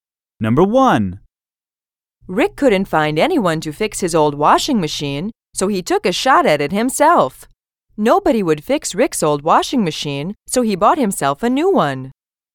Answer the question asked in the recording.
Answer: Different is the correct answer.